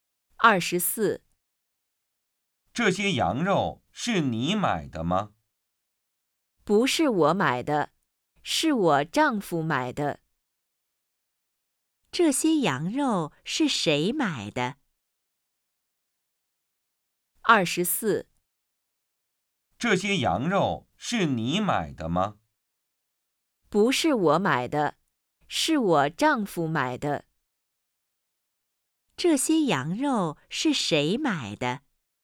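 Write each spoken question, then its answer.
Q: 这些羊肉是谁买的?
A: 她丈夫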